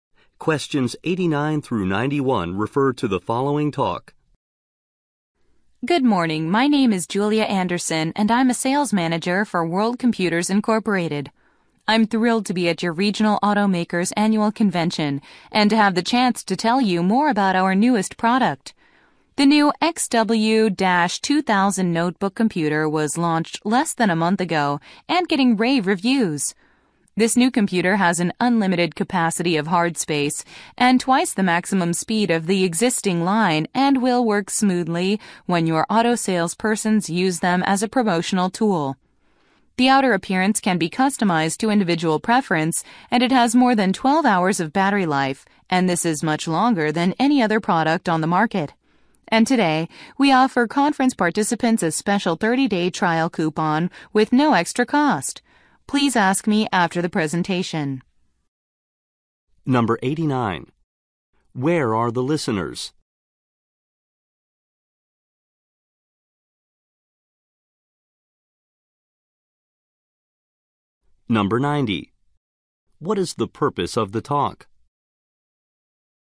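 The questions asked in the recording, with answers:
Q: Where are the listeners?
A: At an automakers' convention

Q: What is the purpose of the talk?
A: To promote a new notebook computer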